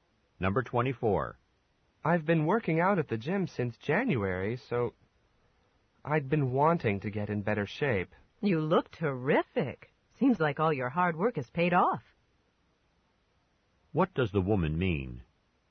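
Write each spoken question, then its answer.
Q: What does the woman mean?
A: The man looks in better shape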